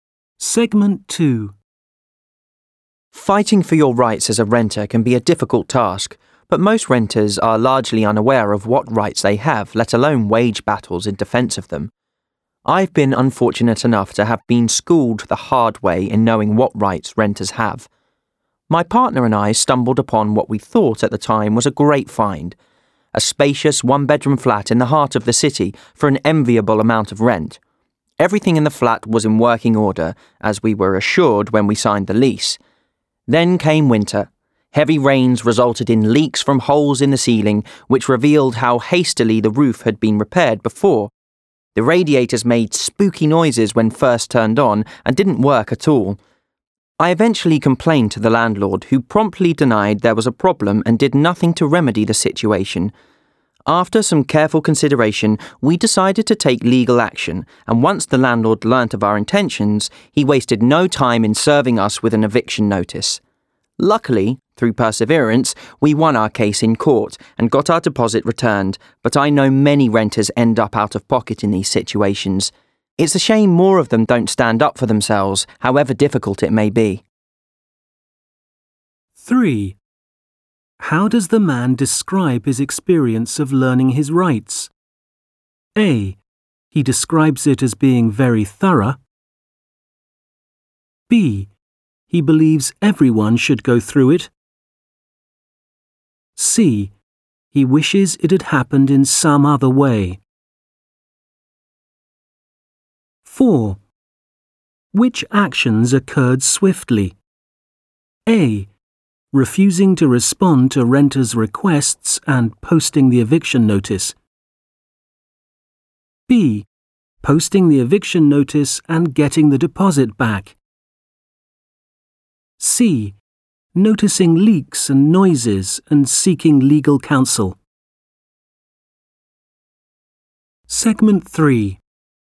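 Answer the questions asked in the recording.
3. C: He wishes it had happened in some other way.
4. A: Refusing to respond to renters' requests and posting the eviction notice.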